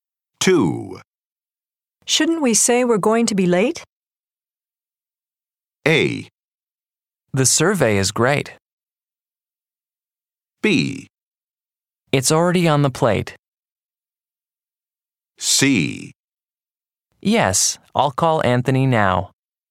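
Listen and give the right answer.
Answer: C: Yes, I'll call Anthony now.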